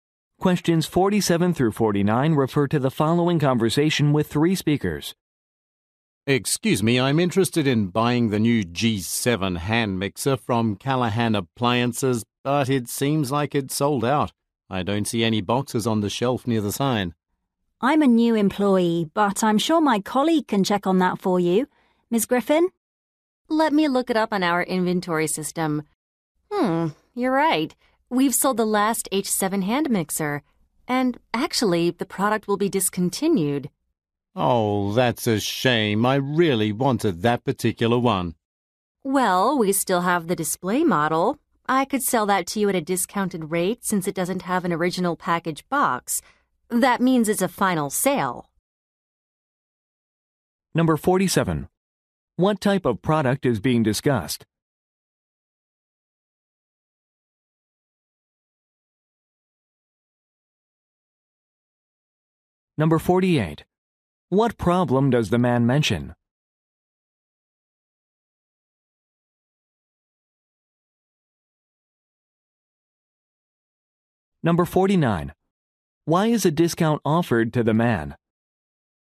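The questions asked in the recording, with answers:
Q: What type of product is being discussed?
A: A hand mixer

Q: What problem does the man mention?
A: The product seems to be sold out

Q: Why is a discount offered to the man?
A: It is a display model without its original box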